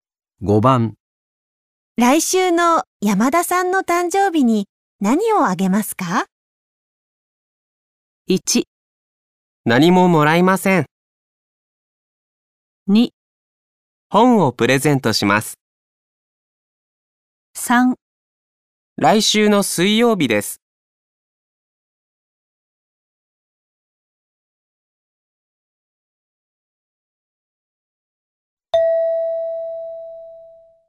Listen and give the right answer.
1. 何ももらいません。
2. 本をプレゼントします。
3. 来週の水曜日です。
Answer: 2. 本をプレゼントします。

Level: N5 Listening · Test 3